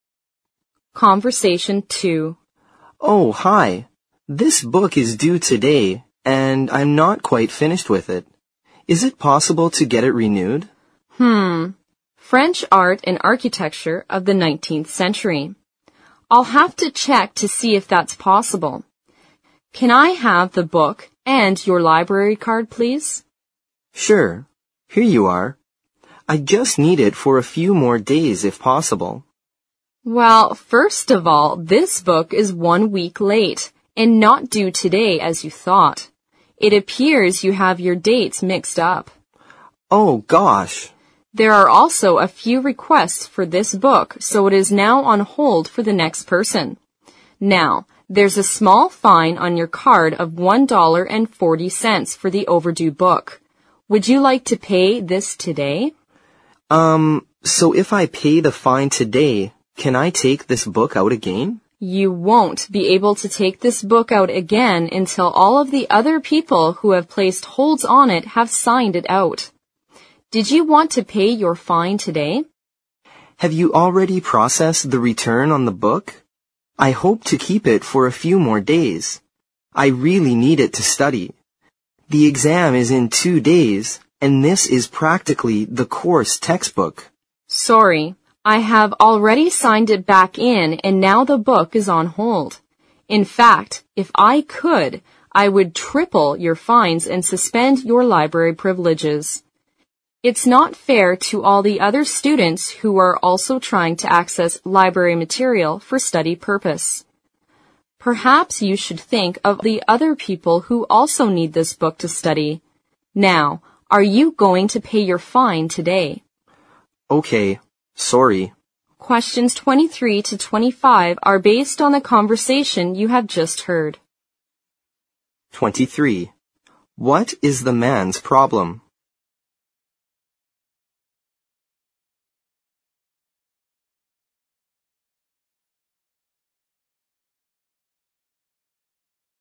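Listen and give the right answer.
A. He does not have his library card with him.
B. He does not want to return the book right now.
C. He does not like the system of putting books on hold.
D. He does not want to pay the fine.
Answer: B. He does not want to return the book right now.

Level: 四级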